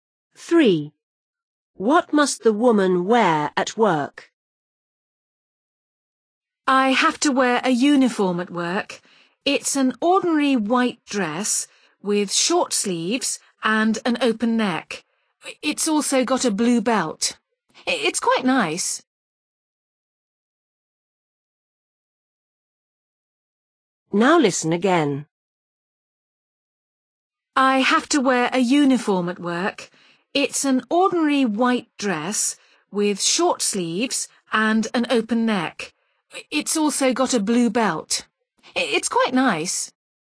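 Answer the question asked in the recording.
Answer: A white dress with short sleeves, an open neck and a blue belt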